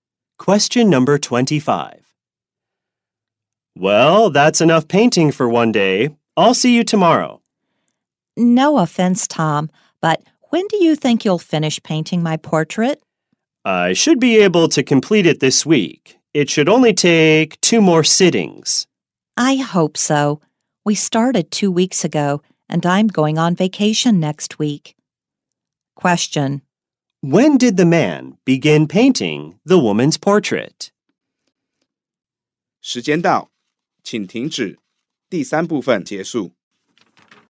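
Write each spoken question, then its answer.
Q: When did the man begin painting the woman's portrait?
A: Two weeks ago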